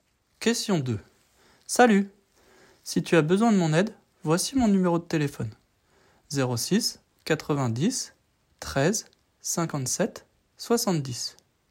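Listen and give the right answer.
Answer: 06 90 13 57 70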